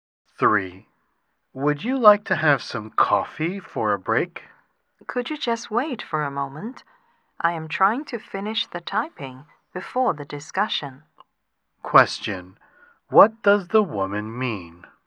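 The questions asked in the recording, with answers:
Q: What does the woman mean?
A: She wants to finish her typing before having coffee.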